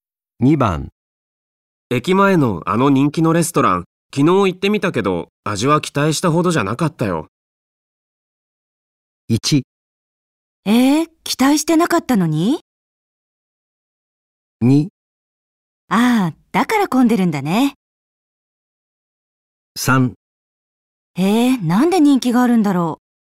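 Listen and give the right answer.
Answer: 3: なんで人気があるんだろう。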